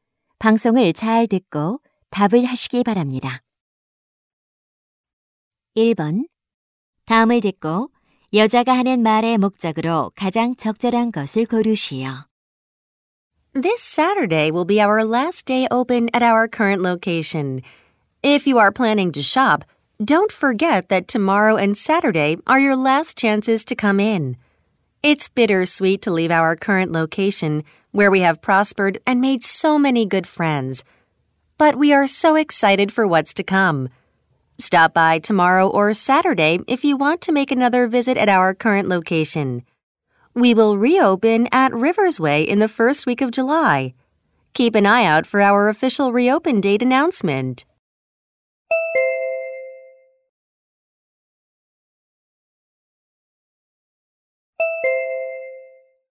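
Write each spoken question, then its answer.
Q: 다음을 듣고 여자가 하는 말의 목적으로 가장 적절한 것을 고르시오.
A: 가게 이전(현 위치 영업 종료)을 알리려고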